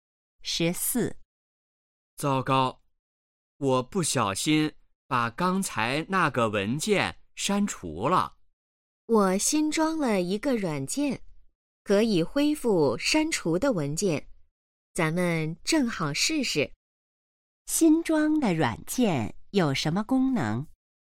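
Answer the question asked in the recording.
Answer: 恢复删除的文件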